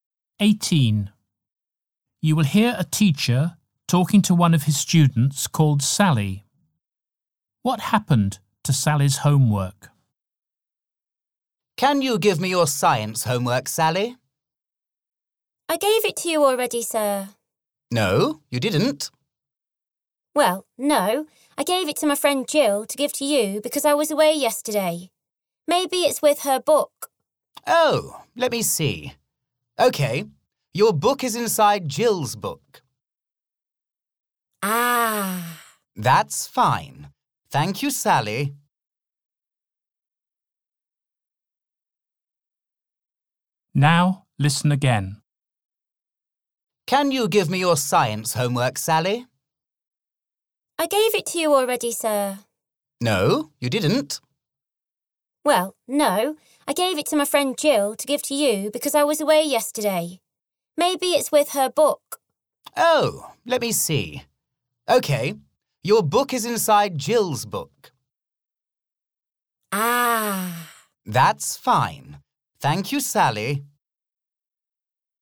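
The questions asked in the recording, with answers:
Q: What happened to Sally's homework?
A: Her friend Jill had it, inside Jill's book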